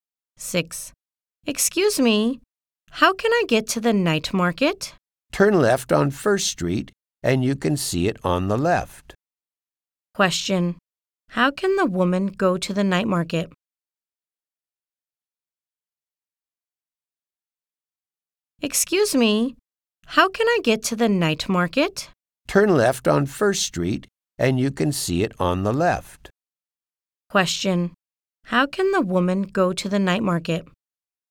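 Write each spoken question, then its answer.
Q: How can the woman go to the night market?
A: Turn left on First Street; it's on the left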